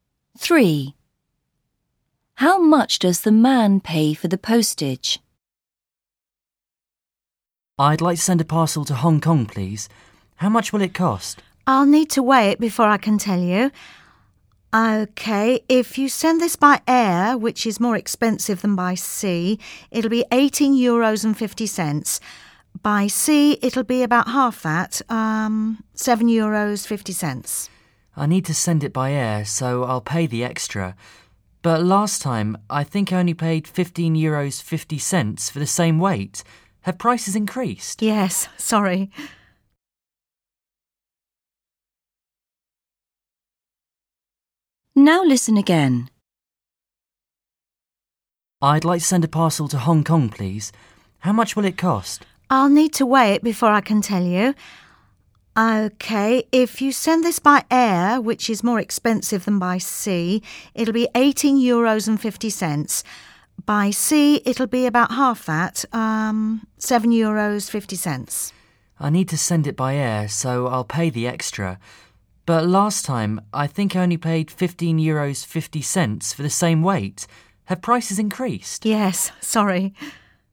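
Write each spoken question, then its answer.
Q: How much does the man pay for the postage?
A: €18.50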